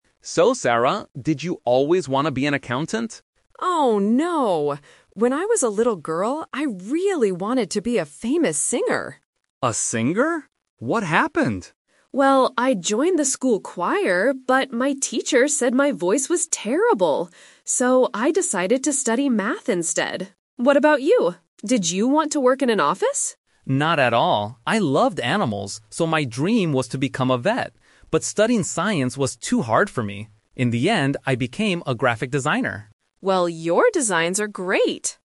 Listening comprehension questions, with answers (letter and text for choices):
Listen to two colleagues, Dave and Sarah, talking during their coffee break. Then, read the questions below and choose the correct answer (A, B, or C) for each question.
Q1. What was Sarah's dream job when she was a child?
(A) An accountant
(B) A singer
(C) A math teacher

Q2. Why didn't Dave become a vet?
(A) He didn't like animals anymore.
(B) He wanted to work in an office.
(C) Science was too difficult for him.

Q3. What is Dave's job now?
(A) A graphic designer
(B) A vet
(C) A scientist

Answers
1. (B) A singer
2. (C) Science was too difficult for him.
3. (A) A graphic designer

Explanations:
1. Sarah says, "When I was a little girl, I really wanted to be a famous singer." Option (A) is a trap; an accountant is what she is now, not her childhood dream. Option (C) is a trap; she studied math later because of her bad singing voice, but she didn't dream of being a math teacher.
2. Dave says his dream was to become a vet, "But studying science was too hard for me." Option (A) is a trap; he actually says "I loved animals," so he still liked them. Option (B) is a trap; he clearly states "Not at all" when asked if he wanted to work in an office.
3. Dave says about his career path, "In the end, I became a graphic designer." Option (B) is a trap; a vet is what he wanted to be, but he didn't achieve it. Option (C) is a trap; the word "science" is mentioned, but it was too hard for him, so he is not a scientist.

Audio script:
Dave: So, Sarah, did you always want to be an accountant?
Sarah: Oh, no! When I was a little girl, I really wanted to be a famous singer.
Dave: A singer? What happened?
Sarah: Well, I joined the school choir, but my teacher said my voice was terrible! So, I decided to study math instead. What about you? Did you want to work in an office?
Dave: Not at all. I loved animals, so my dream was to become a vet. But studying science was too hard for me. In the end, I became a graphic designer.
Sarah: Well, your designs are great!